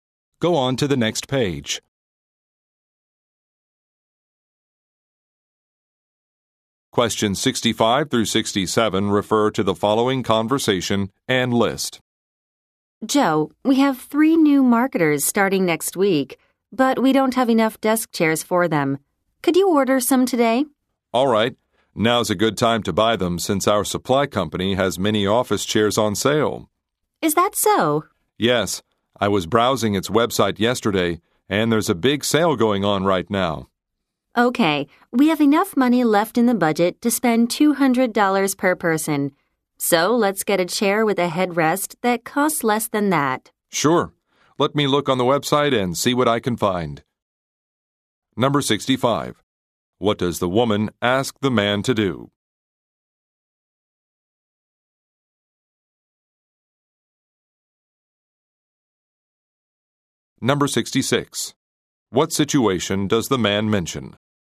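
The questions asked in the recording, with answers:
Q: What does the woman ask the man to do?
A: Order desk chairs

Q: What situation does the man mention?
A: The supply company is having a big sale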